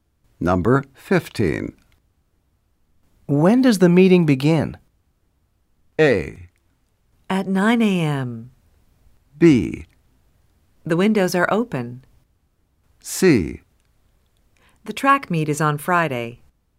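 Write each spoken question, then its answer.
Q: When does the meeting begin?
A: A: At 9 a.m.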